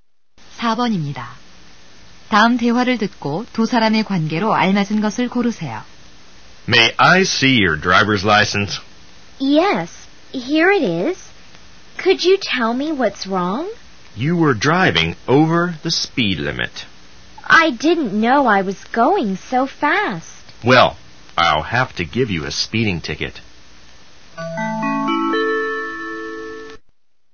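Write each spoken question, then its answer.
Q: 다음 대화를 듣고 두 사람의 관계로 알맞은 것을 고르세요.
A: 경찰관과 운전자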